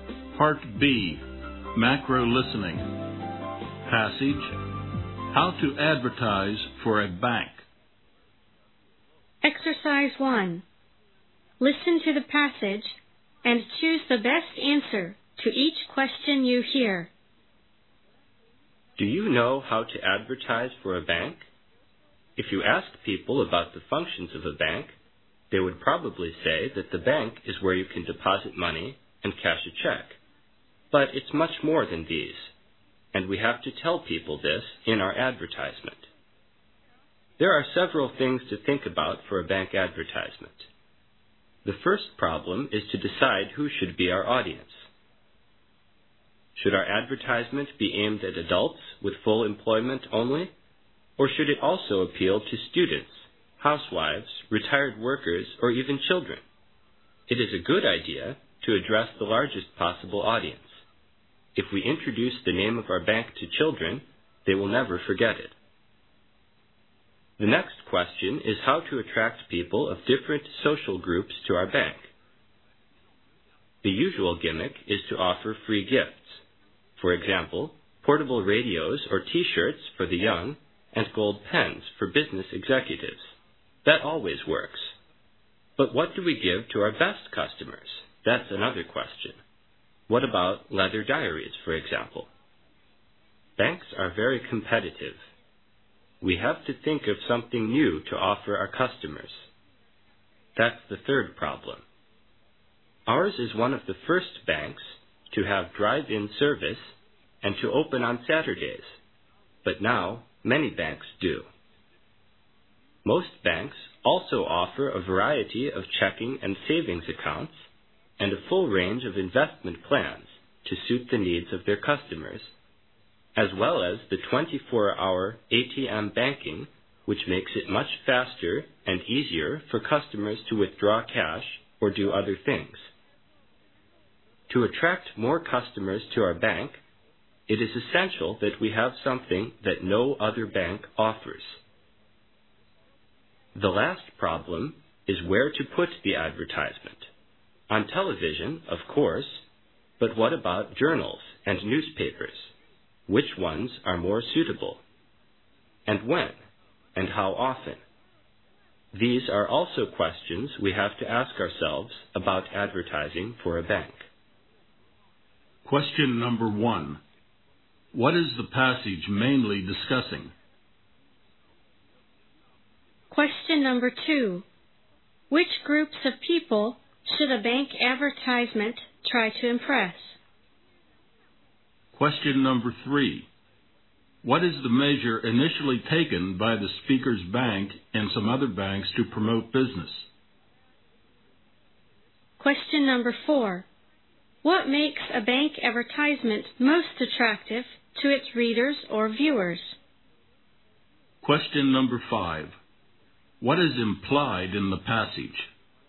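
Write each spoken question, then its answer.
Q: What is the passage mainly discussing?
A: How to advertise for a bank

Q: Which groups of people should a bank advertisement try to impress?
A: The largest possible audience, including students, housewives, retired workers and children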